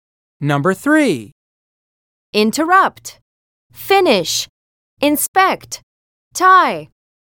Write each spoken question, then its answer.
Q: Interrupt, finish, inspect, tie.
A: Letter V is correct.